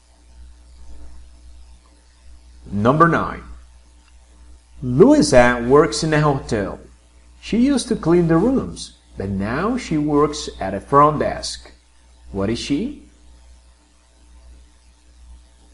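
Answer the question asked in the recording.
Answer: a receptionist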